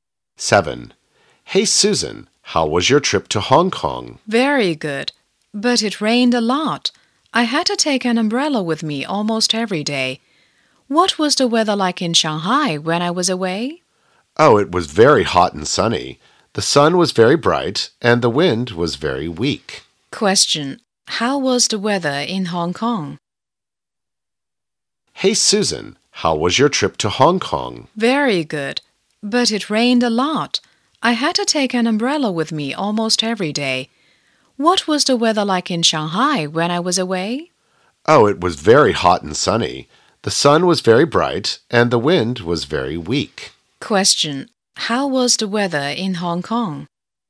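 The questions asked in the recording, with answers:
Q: how was the weather in Hong Kong?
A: Rainy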